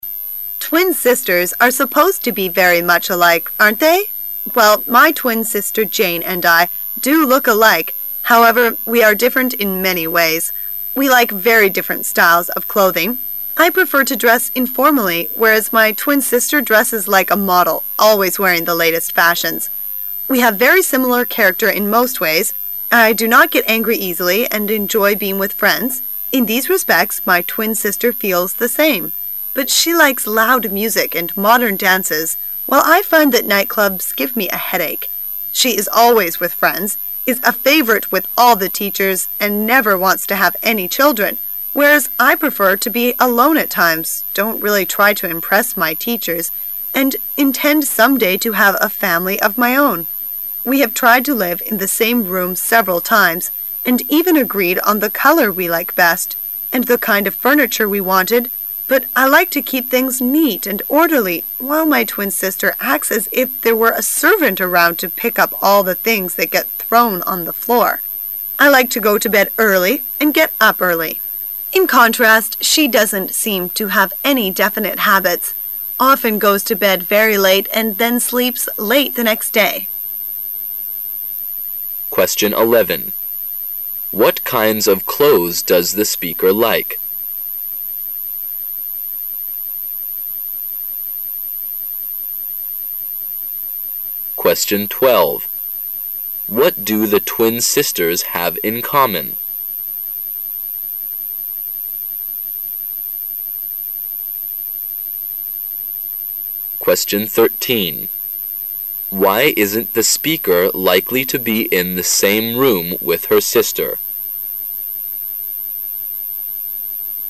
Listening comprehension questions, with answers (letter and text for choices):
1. What do the twin sisters have in common?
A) They enjoy loud music.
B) They want to have children.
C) They enjoy modern dances.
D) They seldom lose their temper.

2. Why isn't the speaker likely to be in the same room with her sister?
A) They can't agree on the color of the room.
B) They can't agree on the kind of furniture.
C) The speaker likes to keep things neat while her twin sister doesn't.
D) Her twin sister often brings friends home and this annoys the speaker.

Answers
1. D) They seldom lose their temper.
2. C) The speaker likes to keep things neat while her twin sister doesn't.

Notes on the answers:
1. 推理题。选项[D]符合题意,依据是听力材料中的I do not get angry easily and enjoy being with friends;in these respects.my twin sister feels the same(我很少跟别人生气喜欢和朋友在一起,在这点上,我妹妹和我相同),seldom lose their temper 是 not get angry easily的同义转述。
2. 细节题。选项[C]符合题意。依据是听力材料中的but I like to keep things neat and orderly,...get thrown on the floor(我喜欢屋子里整洁有序,而我的妹妹就好像那里有一个仆人随时准备收拾她扔在地板上的东西似的),即妹妹的屋子里不是那么整洁有序。

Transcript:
[解析] 11-13 Twin sisters are supposed to be very much alike, aren't they? Well, my twin sister Jane and I do look alike, however, we are different in many ways. We like very different styles of clothing. I prefer to dress informally, whereas my twin sister dresses like a model, always wearing the latest fashions. We have very similar character in most ways. I do not get angry easily and enjoy being with friends; in these respects, my twin sister feels the same. But she likes loud music and modern dances, while I find that nightclubs give me a headache. She is always with friends, is a favorite with all the teachers, and never wants to have any children, whereas I prefer to be alone at times, don't really try to impress my teachers and intend some day to have a family of my own. We have tried to live in the same room several times, and even agreed on the color we like best, and the kind of furniture we wanted, but I like to keep things neat and orderly, while my twin sister acts as if there were a servant around to pick up all the things that get thrown on the floor. I like to go to bed early and get up early; in contrast, she doesn't seem to have any definite habits, often goes to bed very late, and then sleep late the next day. 11.What kinds of clothes does the speaker like?